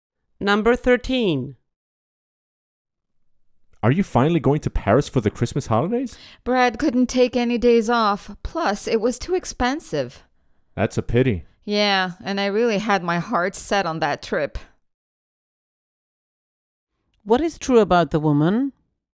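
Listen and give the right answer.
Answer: She is disappointed she is not going to Paris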